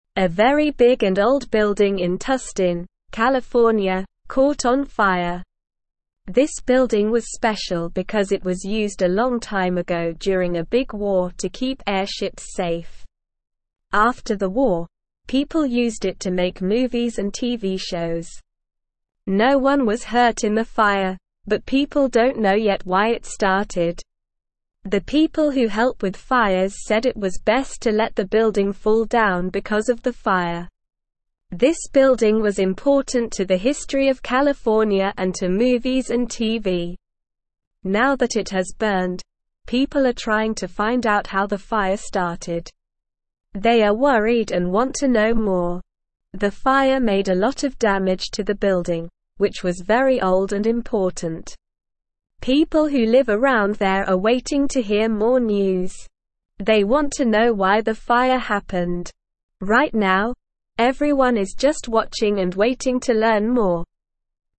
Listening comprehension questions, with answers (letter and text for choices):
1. What happened to the building in Tustin, California?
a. It was torn down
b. It was renovated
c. It caught on fire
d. It was moved to a new location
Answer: c. It caught on fire

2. What was the building used for during a big war?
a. To keep airships safe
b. To make movies and TV shows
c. To store food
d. To house soldiers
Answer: a. To keep airships safe

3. What happened to the building after the war?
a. It was turned into a museum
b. It was abandoned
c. It was used to make movies and TV shows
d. It was used as a school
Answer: c. It was used to make movies and TV shows

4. What did the people who help with fires say about the building?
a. It could be saved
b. It was best to let it fall down because of the fire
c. It should be renovated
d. It should be moved to a new location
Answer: b. It was best to let it fall down because of the fire

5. What do people want to know about the fire?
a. How it spread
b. Who caused it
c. When it will be put out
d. Why it started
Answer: d. Why it started

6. What was the building important to?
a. The history of California and movies and TV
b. The history of California and the military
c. The history of California and technology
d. The history of California and sports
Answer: a. The history of California and movies and TV

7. What did the fire make to the building?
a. A lot of noise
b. A lot of damage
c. A lot of mess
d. A lot of changes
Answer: b. A lot of damage

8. What are the people who live around there doing?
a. Leaving the area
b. Trying to put out the fire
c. Ignoring the situation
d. Waiting to hear more news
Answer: d. Waiting to hear more news

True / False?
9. People are not trying to find out how the fire started.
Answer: False

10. After the war, the building was used to make movies and TV shows.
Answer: True

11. No one was hurt in the fire.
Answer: True

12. The fire made a lot of damage to the building, which was very old and important.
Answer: True

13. The building was unimportant to the history of California and to movies and TV.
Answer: False

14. The building was never used during a big war to keep airships safe.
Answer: False

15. A small and new building in Tustin, California, caught on fire.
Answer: False

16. The people who help with fires said it was best to let the building fall down because of the fire.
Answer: True

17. This building was (1)______ because it was (2)______ a long time ago during a big war to keep airships (3)______.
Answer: special

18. This building was (1)______ because it was (2)______ a long time ago during a big war to keep airships (3)______.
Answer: used

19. This building was (1)______ because it was (2)______ a long time ago during a big war to keep airships (3)______.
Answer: safe

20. No one was hurt in the fire, but (4)______ don't know yet why it started.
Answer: people

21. The people who help with fires (5)______ it was best to let the building (6)______ down because of the fire.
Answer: said

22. The people who help with fires (5)______ it was best to let the building (6)______ down because of the fire.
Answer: fall

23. Now that it has burned, people are (7)______ to (8)______ out how the fire started.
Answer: trying

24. Now that it has burned, people are (7)______ to (8)______ out how the fire started.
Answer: find

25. They are worried and want to know (9)______.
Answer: more

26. The fire made a lot of damage to the building, which was very old and (10)______.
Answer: important

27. (11)______ who (12)______ around there are waiting to hear more news.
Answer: People

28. (11)______ who (12)______ around there are waiting to hear more news.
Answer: live

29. What happened to the big building in Tustin, California?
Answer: The big building in Tustin, California, caught on fire.

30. What was the building used for a long time ago?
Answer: A long time ago, the building was used to keep airships safe during a big war.

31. What did people use the building for after the war?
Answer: After the war, people used the building to make movies and TV shows.

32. Was anyone hurt in the fire?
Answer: No, no one was hurt in the fire.

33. What did the fire people decide to do with the building because of the fire?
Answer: The fire people decided it was best to let the building fall down because of the fire.

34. Why is the building important?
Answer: The building is important because it is part of California's history and was used for movies and TV.

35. What are the people who live around the building waiting to find out?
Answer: The people who live around the building are waiting to find out why the fire happened.

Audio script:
A very big and old building in Tustin, California, caught on fire. This building was special because it was used a long time ago during a big war to keep airships safe. After the war, people used it to make movies and TV shows. No one was hurt in the fire, but people don't know yet why it started.
This building was important to the history of California and to movies and TV. Now that it has burned, people are trying to find out how the fire started. They are worried and want to know more.
People who live around there are waiting to hear more news. They want to know why the fire happened. Right now, everyone is just watching and waiting to learn more.

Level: Level 2